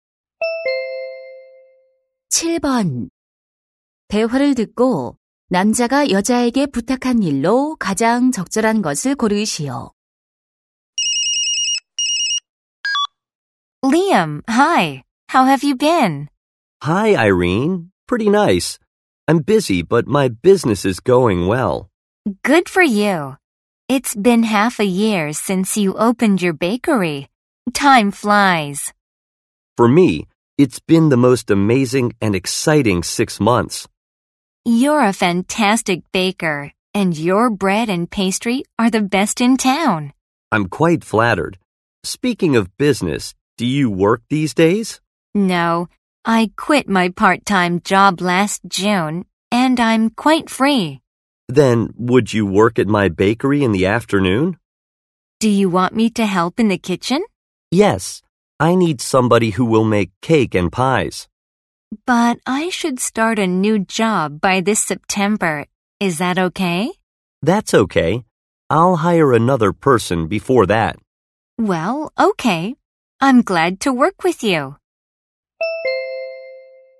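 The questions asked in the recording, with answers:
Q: 대화를 듣고 남자가 여자에게 부탁한 일로 가장 적절한 것을 고르시오.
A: 오후에 빵집에서 케이크와 파이 만드는 일을 하기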